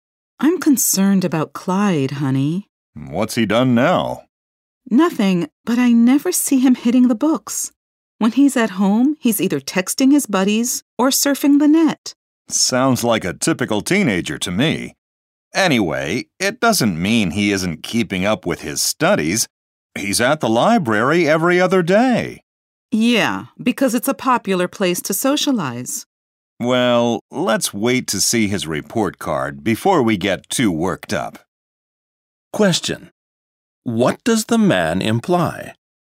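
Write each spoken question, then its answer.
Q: What does the man imply?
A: Clyde may be keeping up with his studies, so they should wait for his report card before worrying.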